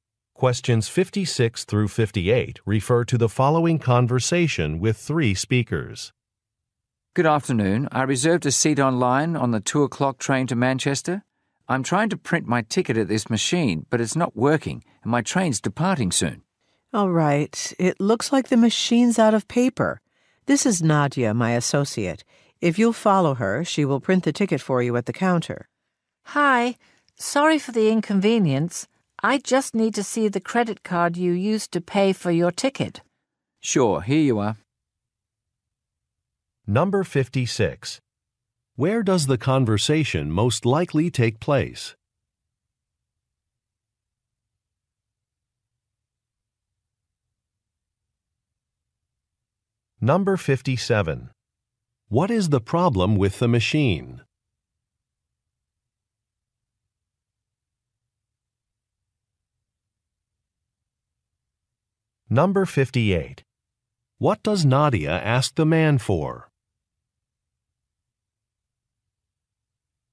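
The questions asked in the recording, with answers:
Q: Where does the conversation most likely take place?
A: At a train station

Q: What is the problem with the machine?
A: It's out of paper

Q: What does Nadia ask the man for?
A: The credit card used to pay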